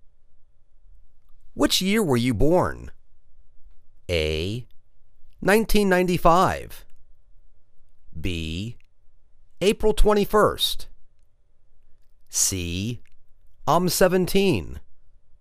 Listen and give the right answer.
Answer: 1995